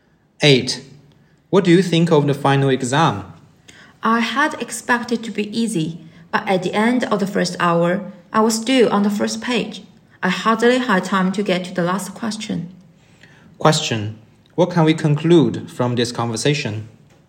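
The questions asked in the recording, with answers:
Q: What can we conclude from this conversation?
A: The exam was harder than expected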